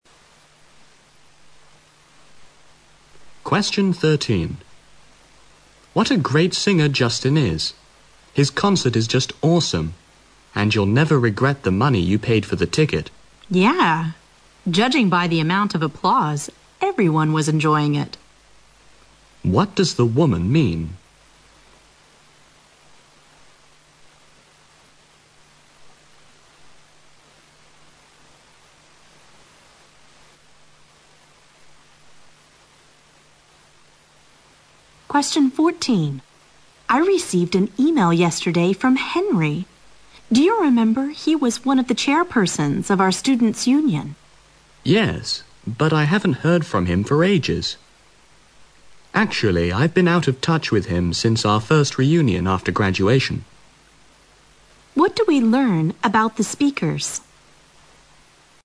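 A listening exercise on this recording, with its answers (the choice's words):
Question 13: What does the woman mean?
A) Applause encourages the singer.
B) She regrets paying for the concert.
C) Almost everyone loves pop music.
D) The concert is very impressive.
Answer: The concert is very impressive.

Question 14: What do we learn about the speakers?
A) They have known each other since their schooldays.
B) They were both chairpersons of the Students' Union.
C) They have been in close touch by email.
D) They are going to hold a reunion party.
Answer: They have known each other since their schooldays.

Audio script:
M: What a great singer Justin is! His concert is just awesome. And you'll never regret the money you paid for the ticket.
W: Yeah. Judging by the amount of the applause, everyone was enjoying it.
Q: What does the woman mean?
W: I received an email yesterday from Henry. Do you remember? 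He was one of the chairpersons of our students union.
M: Yes, but I haven't heard from him for ages. Actually I've been out of touch with him since our first reunion after graduation.
Q: What do we learn about the speakers?

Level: 六级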